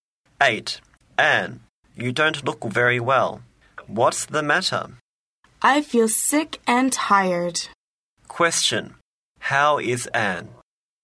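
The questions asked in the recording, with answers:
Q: How is Anne?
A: She feels sick and tired.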